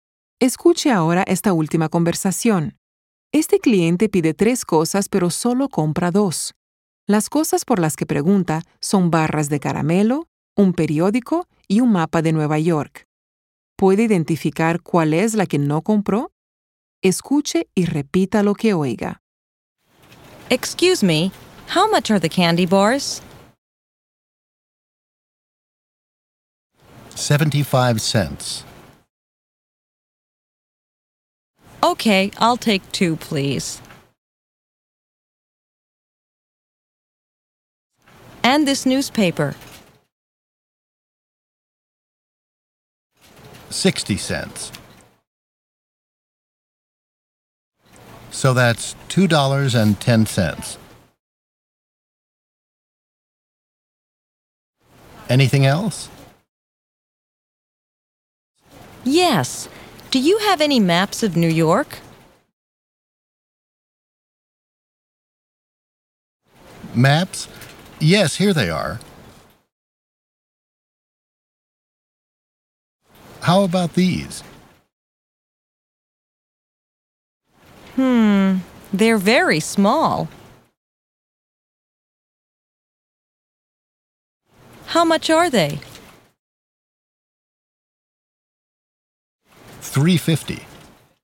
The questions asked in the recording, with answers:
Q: ¿Puede identificar cuál es la que no compró?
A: El mapa es lo que no se llevó.